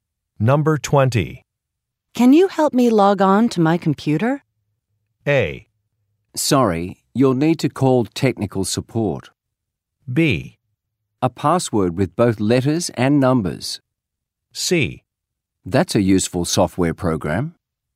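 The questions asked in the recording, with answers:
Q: Can you help me log on to my computer?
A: A: Sorry, you'll need to call technical support.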